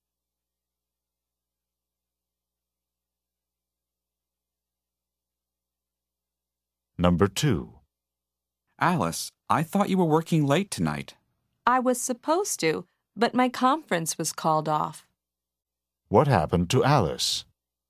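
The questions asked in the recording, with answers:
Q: What happened to Alice?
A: Her conference was cancelled.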